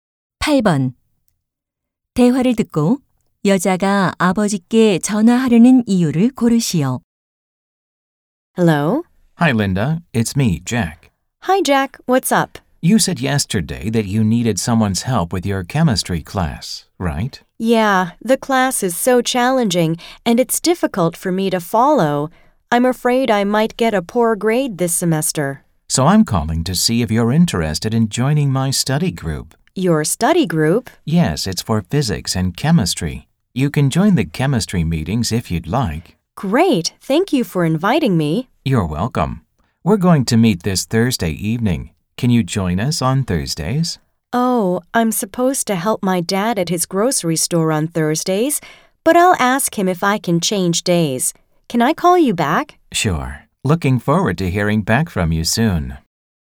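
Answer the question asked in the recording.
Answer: 가게 일을 돕는 요일을 바꿀 수 있는지 물어보려고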